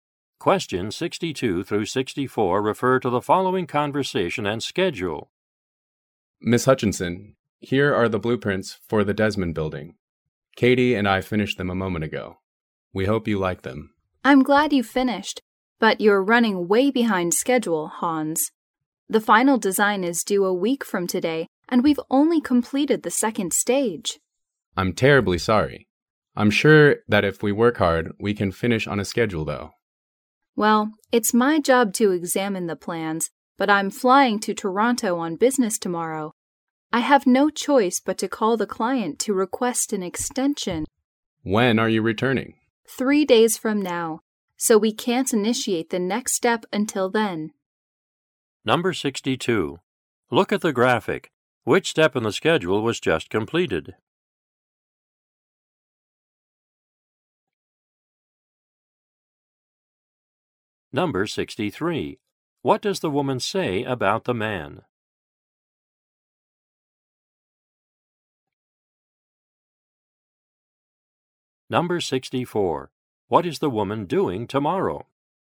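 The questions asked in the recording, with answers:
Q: What does the woman say about the man?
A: He is behind schedule

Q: What is the woman doing tomorrow?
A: Flying to Toronto on business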